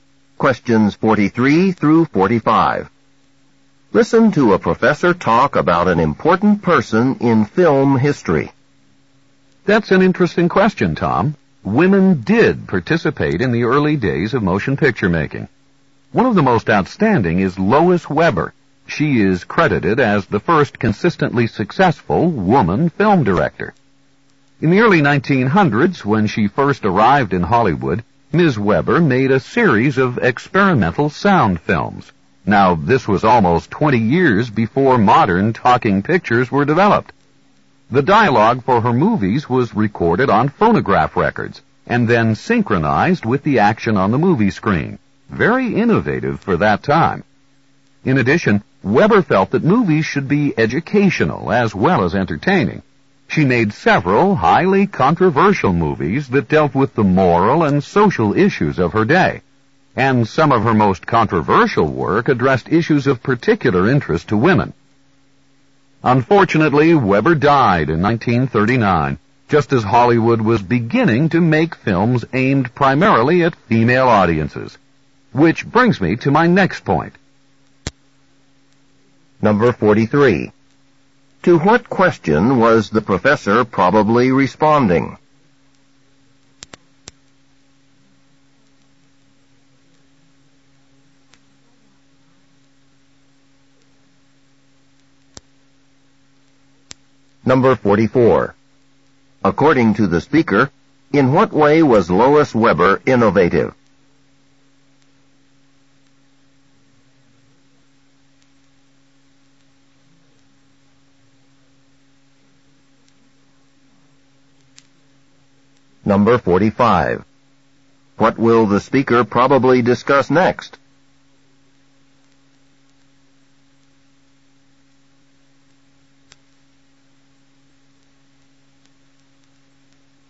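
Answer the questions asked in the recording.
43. Whether women took part in early motion picture making
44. She made experimental sound films about 20 years before modern talking pictures
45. Hollywood films aimed mainly at female audiences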